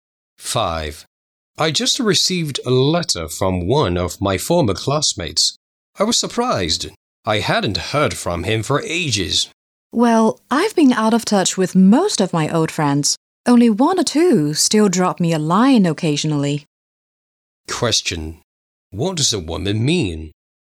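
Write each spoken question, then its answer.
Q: What does a woman mean?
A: She has also lost touch with most of her old friends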